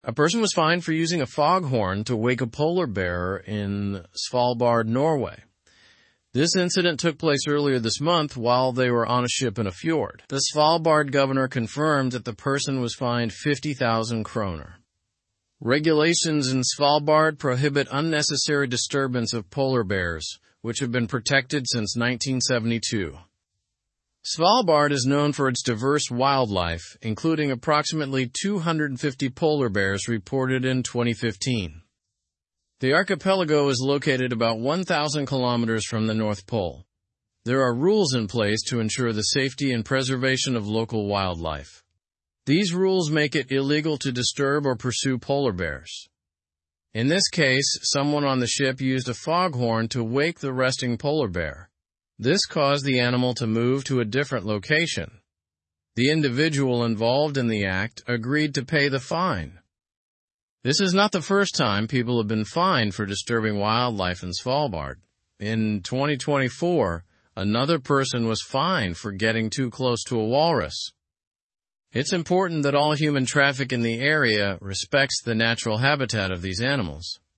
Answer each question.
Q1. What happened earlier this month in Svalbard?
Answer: A person was fined for using a foghorn to wake a polar bear in Svalbard.

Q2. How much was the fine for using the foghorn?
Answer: The fine was 50,000 kroner.

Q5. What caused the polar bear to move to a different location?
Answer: The use of a foghorn caused the polar bear to move.

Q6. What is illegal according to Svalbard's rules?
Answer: It is illegal to disturb or pursue polar bears according to Svalbard's rules.

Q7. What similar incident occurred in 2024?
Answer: Another person was fined in 2024 for getting too close to a walrus in Svalbard.

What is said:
A person was fined for using a foghorn to wake a polar bear in Svalbard, Norway. This incident took place earlier this month while they were on a ship in a fjord. The Svalbard governor confirmed that the person was fined 50,000 kroner. Regulations in Svalbard prohibit unnecessary disturbance of polar bears, which have been protected since 1972.
Svalbard is known for its diverse wildlife, including approximately 250 polar bears reported in 2015. The archipelago is located about 1,000 kilometers from the North Pole. There are rules in place to ensure the safety and preservation of local wildlife. These rules make it illegal to disturb or pursue polar bears.
In this case, someone on the ship used a foghorn to wake the resting polar bear. This caused the animal to move to a different location. The individual involved in the act agreed to pay the fine.
This is not the first time people have been fined for disturbing wildlife in Svalbard. In 2024, another person was fined for getting too close to a walrus. It's important that all human traffic in the area respects the natural habitat of these animals.

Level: Level 3